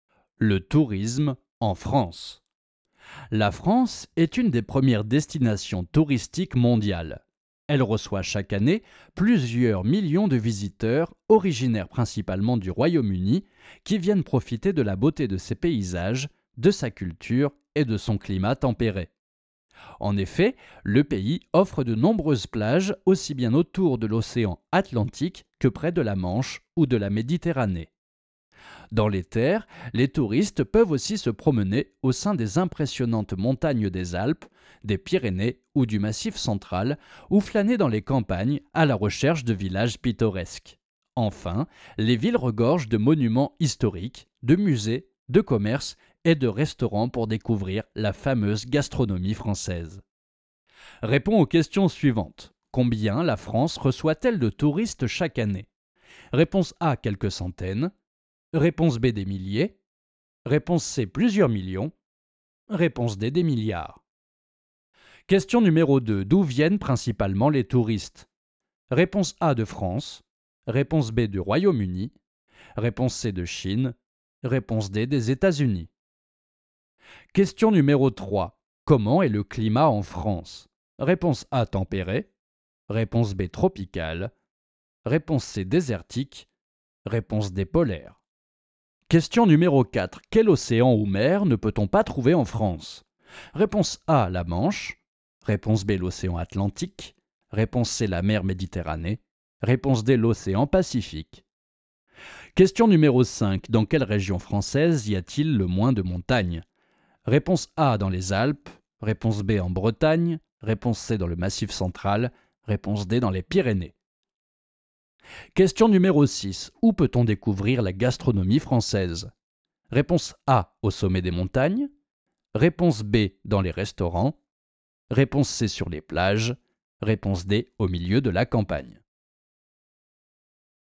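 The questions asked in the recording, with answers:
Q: Combien la France reçoit-elle de touristes chaque année?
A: C: plusieurs millions

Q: D'où viennent principalement les touristes?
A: B: du Royaume-Uni

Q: Comment est le climat en France?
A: A: tempéré

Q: Quel océan ou mer ne peut-on pas trouver en France?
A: D: l'océan Pacifique

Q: Dans quelle région française y a-t-il le moins de montagnes?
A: B: en Bretagne

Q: Où peut-on découvrir la gastronomie française?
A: B: dans les restaurants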